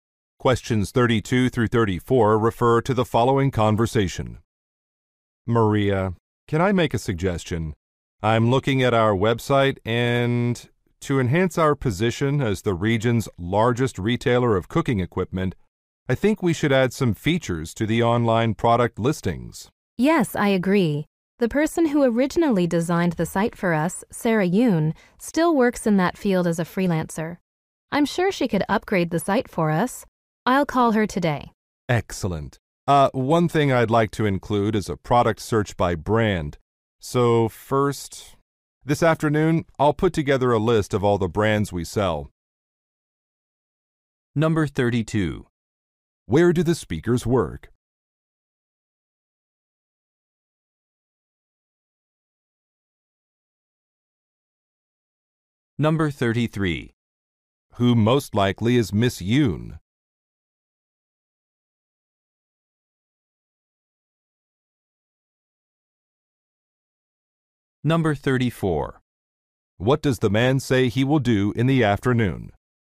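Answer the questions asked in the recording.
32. At a cooking equipment retailer
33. A freelance web designer
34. Make a list of all the brands they sell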